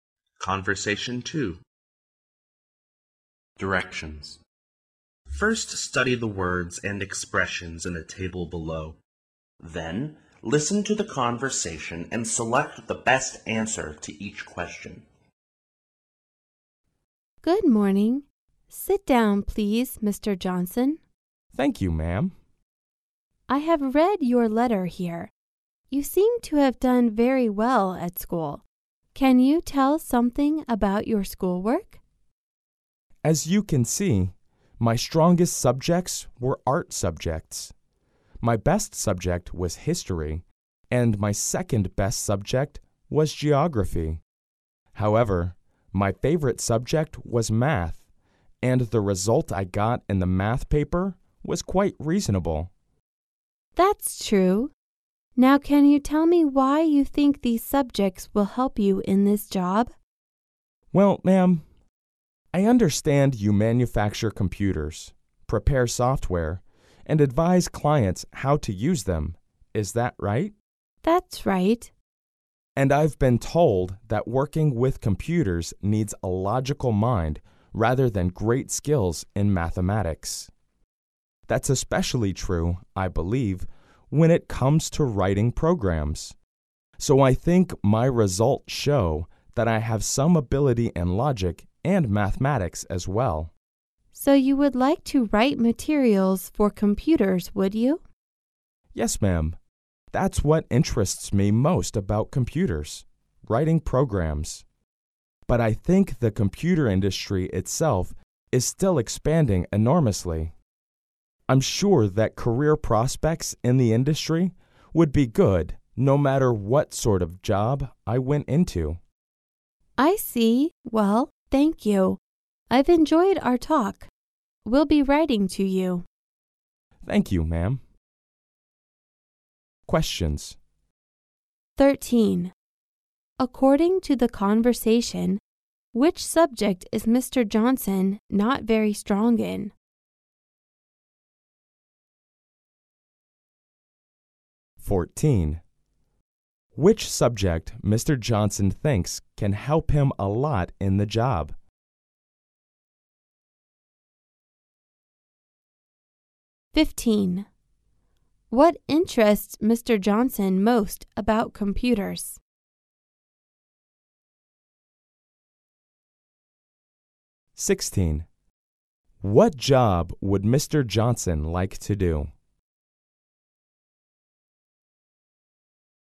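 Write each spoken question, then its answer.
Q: What interests Mr. Johnson most about computers?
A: Writing programs

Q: What job would Mr. Johnson like to do?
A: Writing computer programs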